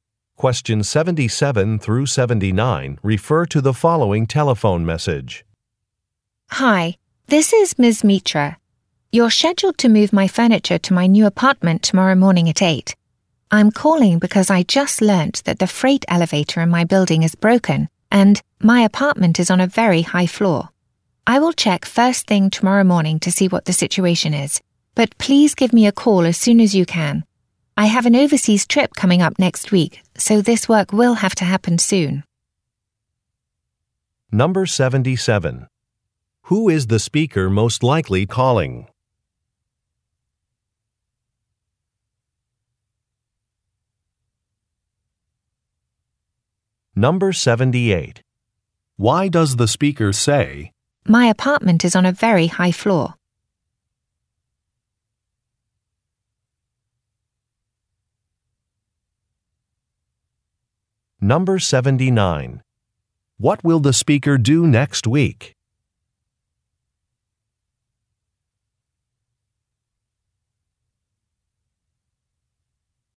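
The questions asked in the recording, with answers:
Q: Who is the speaker most likely calling?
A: A moving company

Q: Why does the speaker say, "My apartment is on a very high floor"?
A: To point out that moving the furniture will be difficult without the elevator

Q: What will the speaker do next week?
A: Go on an overseas trip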